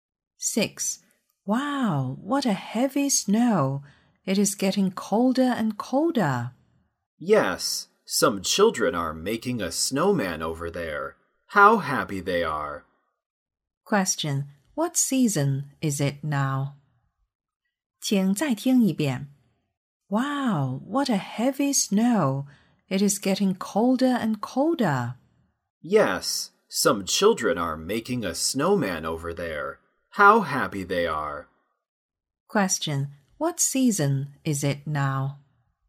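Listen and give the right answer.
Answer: Winter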